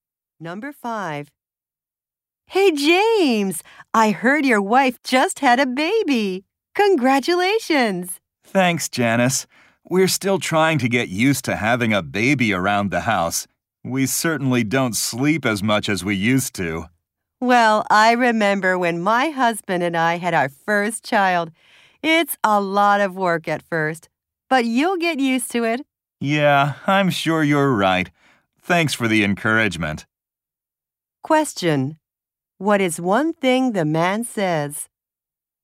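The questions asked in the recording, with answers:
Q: What is one thing the man says?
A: He doesn't sleep as much as before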